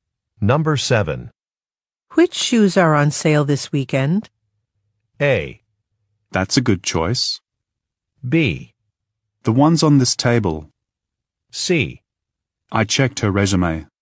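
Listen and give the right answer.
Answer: B: The ones on this table.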